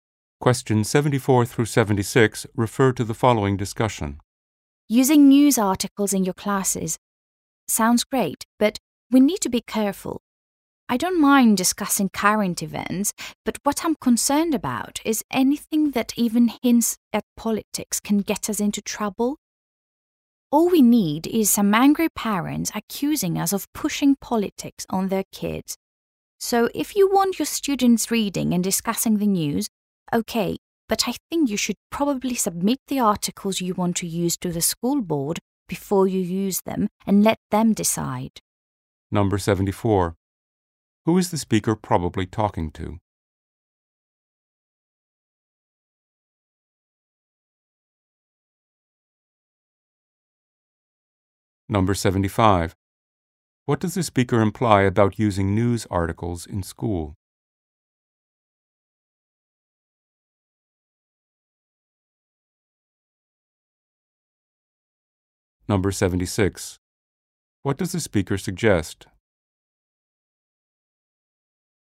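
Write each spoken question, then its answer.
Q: Who is the speaker probably talking to?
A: Teachers

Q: What does the speaker imply about using news articles in school?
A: Anything political could cause trouble with parents

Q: What does the speaker suggest?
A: Submitting articles to the school board before using them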